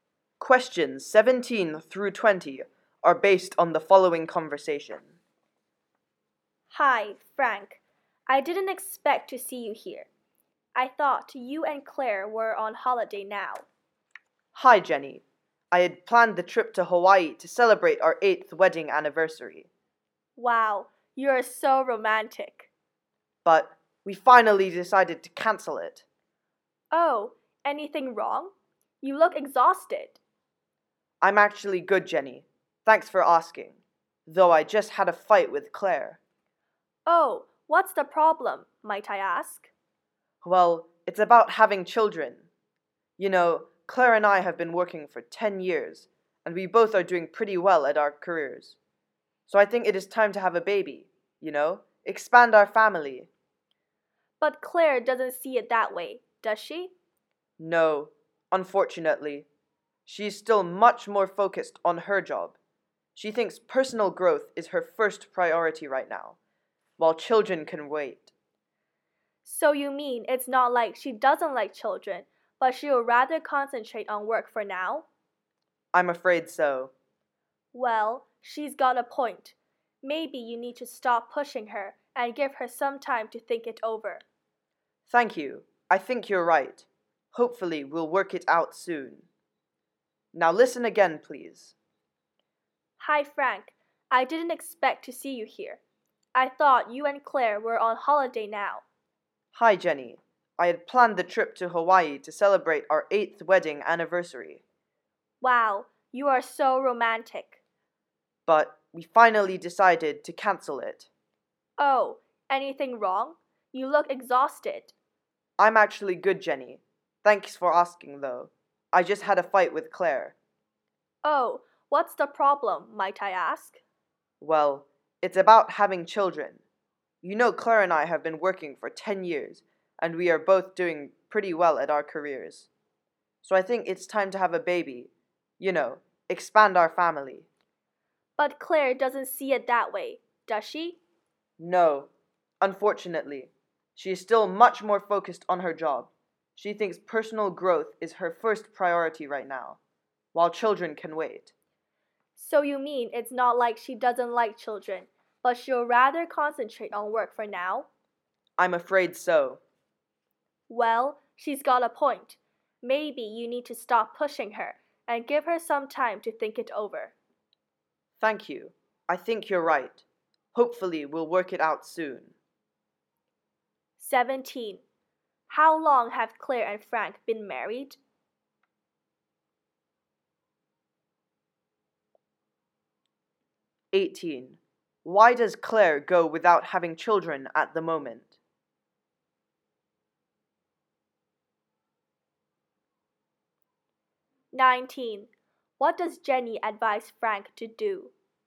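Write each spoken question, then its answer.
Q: How long have Claire and Frank been married?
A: 8 years

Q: Why does Claire go without having children at the moment?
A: She wants to focus on her career and personal growth

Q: What does Jenny advise Frank to do?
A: Stop pushing Claire and give her time to think it over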